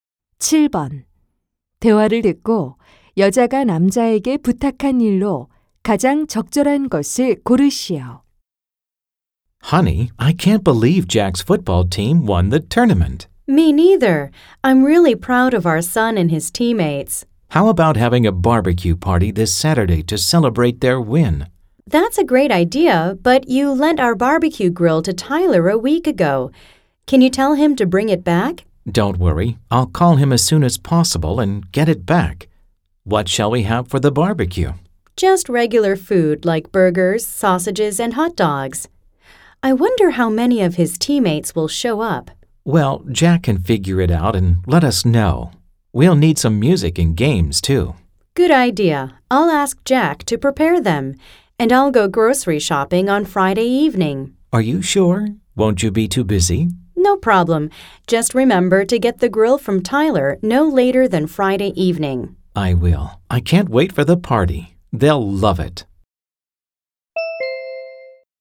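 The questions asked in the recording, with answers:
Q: 대화를 듣고 여자가 남자에게 부탁한 일로 가장 적절한 것을 고르시오.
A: Tyler에게서 바비큐 그릴을 돌려받기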